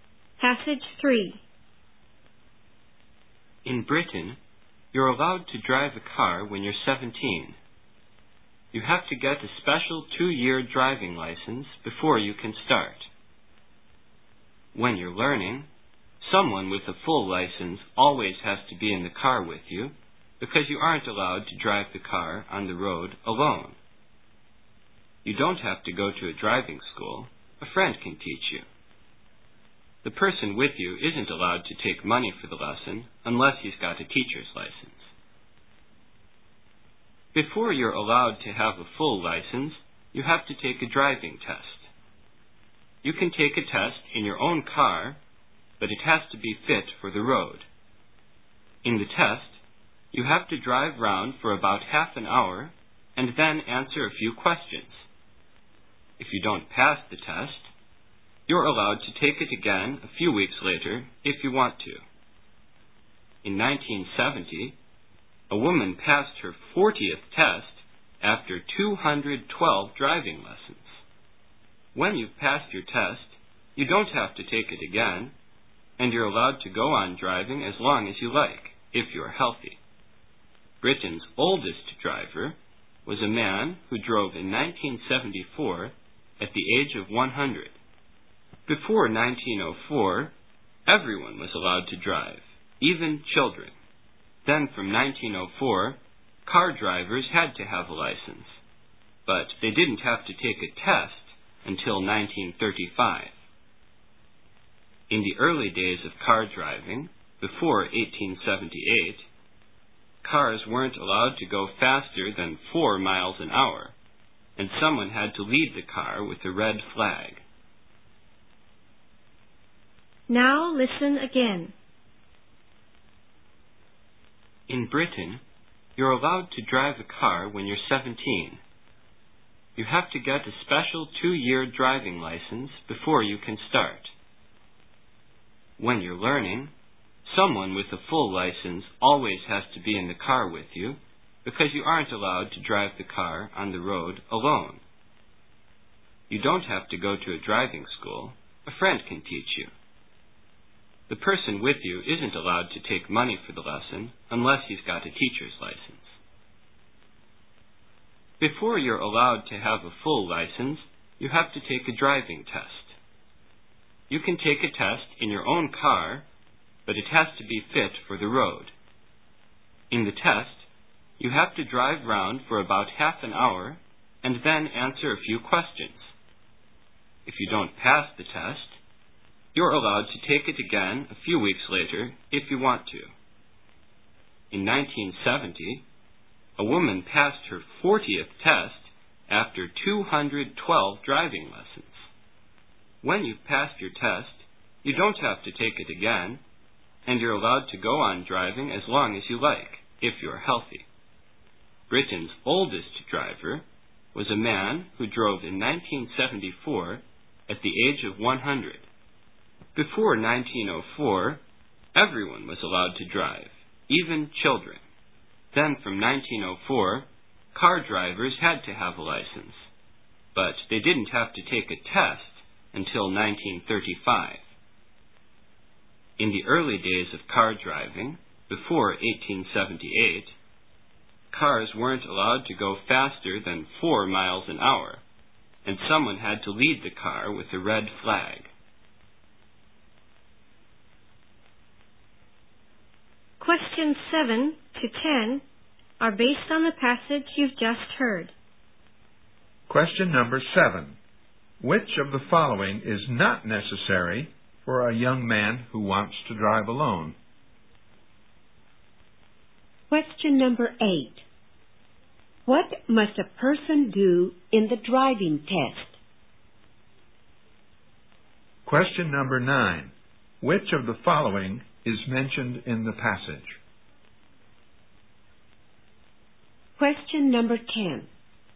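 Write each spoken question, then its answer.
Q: What must a person do in the driving test?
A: Drive round for about half an hour and answer a few questions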